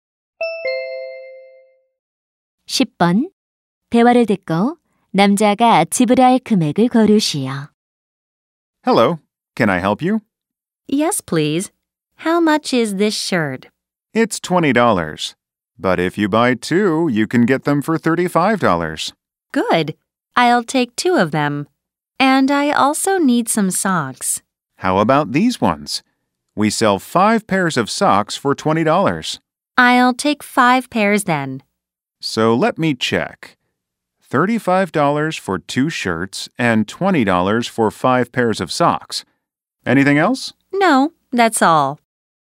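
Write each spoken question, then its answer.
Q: 대화를 듣고 남자가 지불할 금액을 고르시오.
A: 55달러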